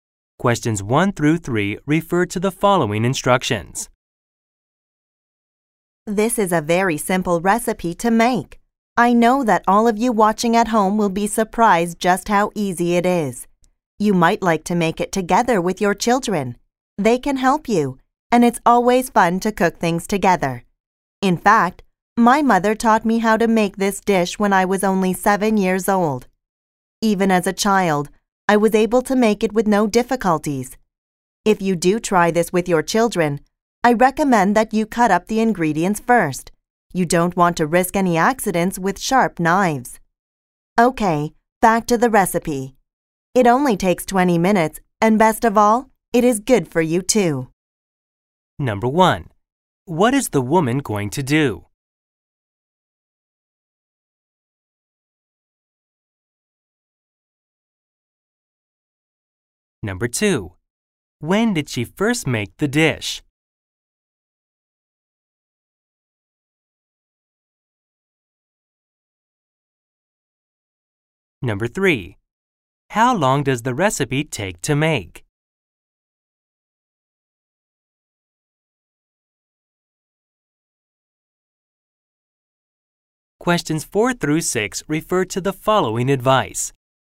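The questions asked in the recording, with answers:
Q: When did she first make the dish?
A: When she was 7 years old

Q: How long does the recipe take to make?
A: 20 minutes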